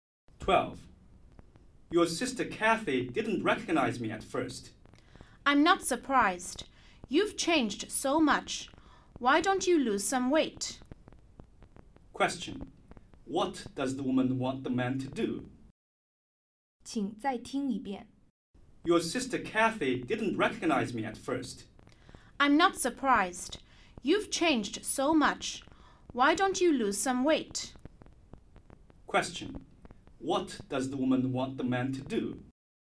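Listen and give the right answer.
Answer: Lose some weight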